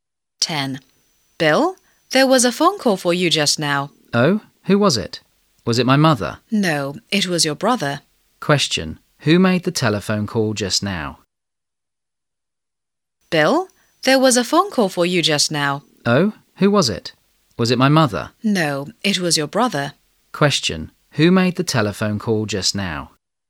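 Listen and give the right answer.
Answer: Bill's brother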